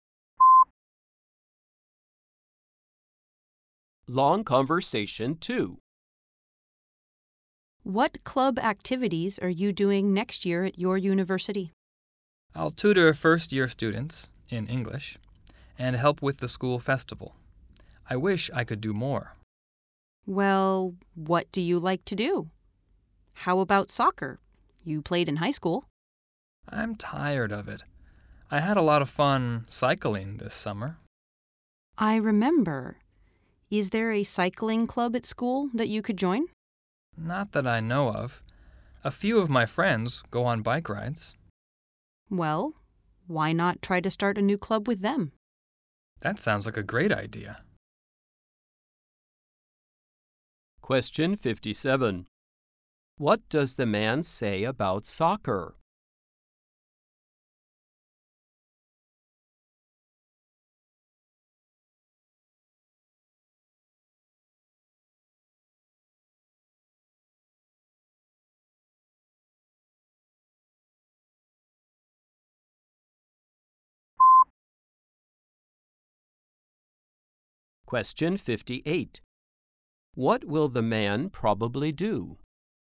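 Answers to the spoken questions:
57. He is tired of it
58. Start a new cycling club with his friends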